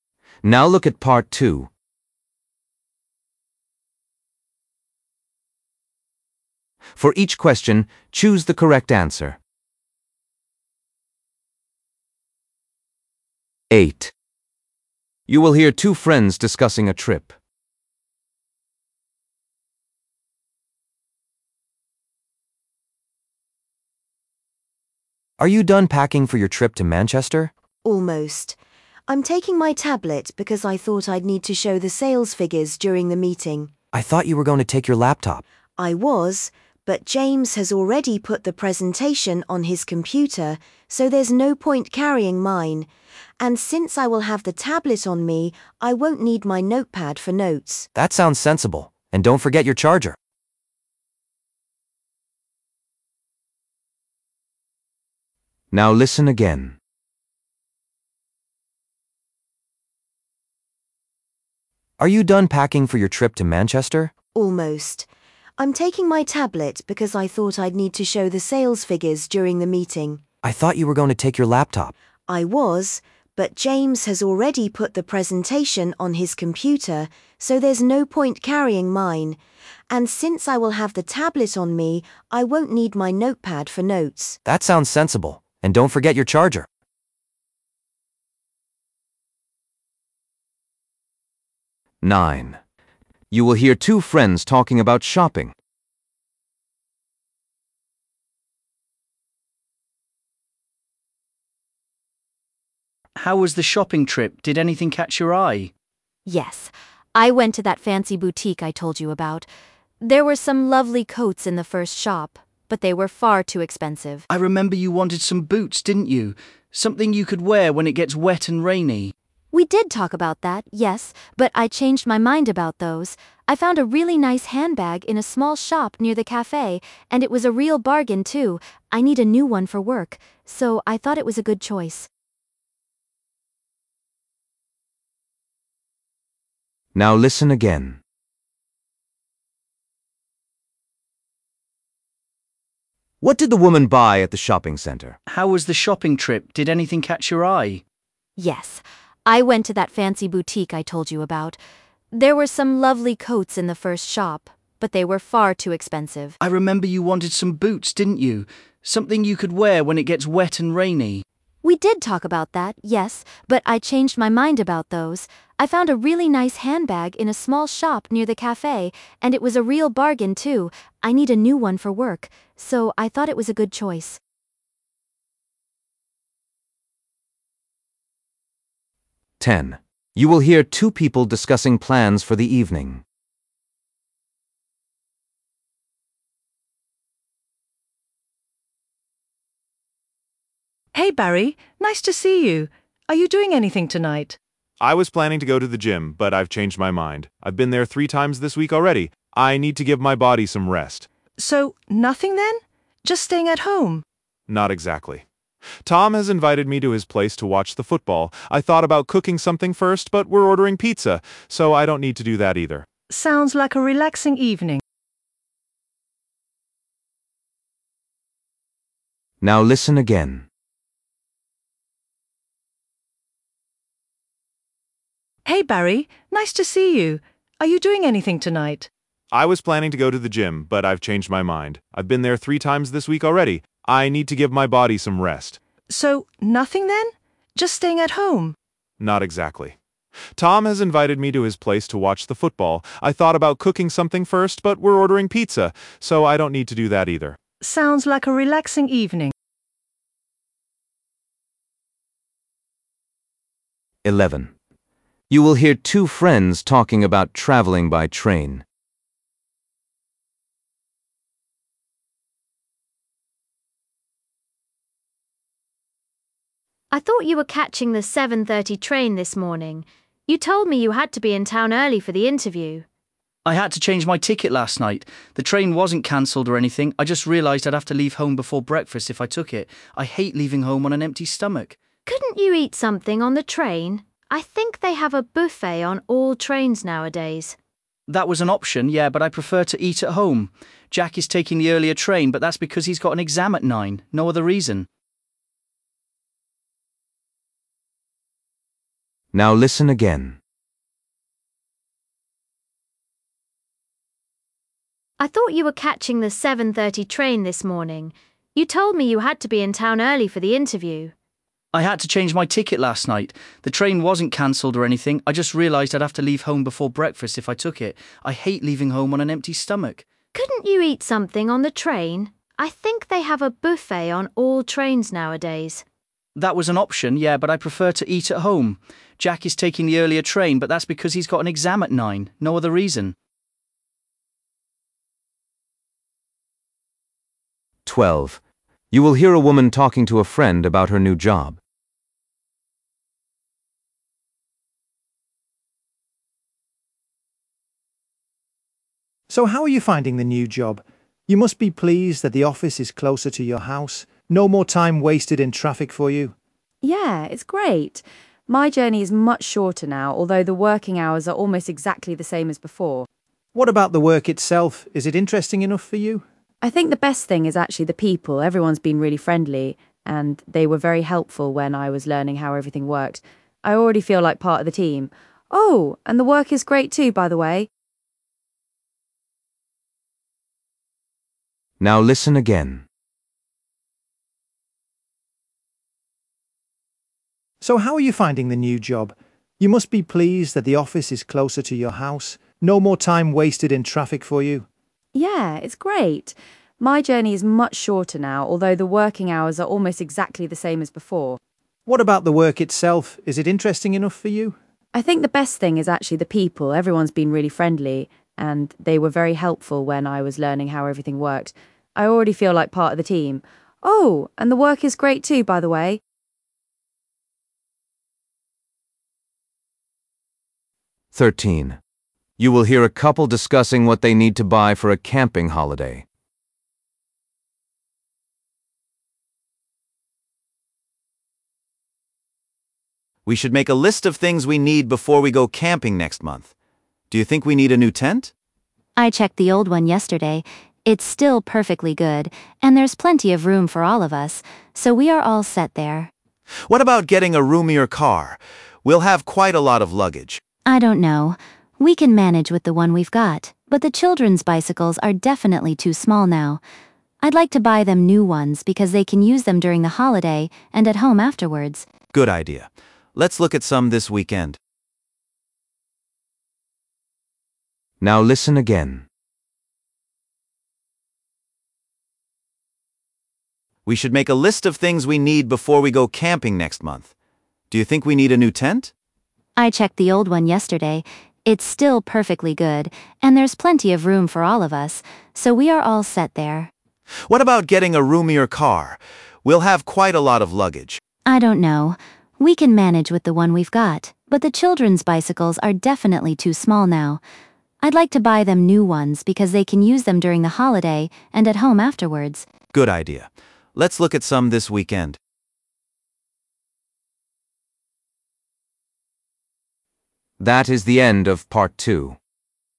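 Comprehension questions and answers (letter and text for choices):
For each question, choose the correct answer.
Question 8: What will the woman take with her on the business trip?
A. A laptop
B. A tablet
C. A notebook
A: B. A tablet

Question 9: What did the woman buy at the shopping centre?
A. A coat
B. A pair of boots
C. A handbag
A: C. A handbag

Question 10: What will the man do this evening?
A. Cook dinner for his friends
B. Go to the gym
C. Watch a football match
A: C. Watch a football match

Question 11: Why did the man choose the later train?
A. The earlier train was cancelled.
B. He wanted to have breakfast first.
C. To the aquarium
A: B. He wanted to have breakfast first.

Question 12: What does the woman like most about her new job?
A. The working hours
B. The people she works with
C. The location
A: B. The people she works with

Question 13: What will the family buy for their holiday?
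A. A new tent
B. Some bicycles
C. A larger car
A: B. Some bicycles

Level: B1 Preliminary (PET)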